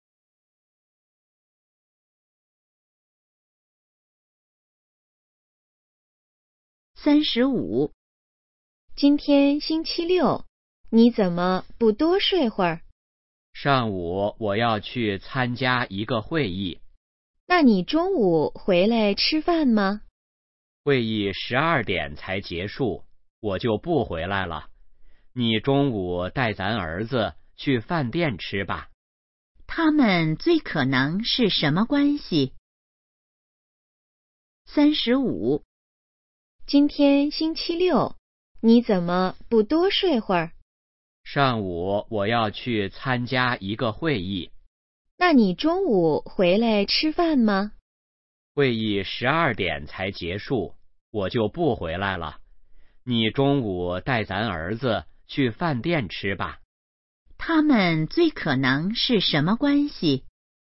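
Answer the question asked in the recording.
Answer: 夫妻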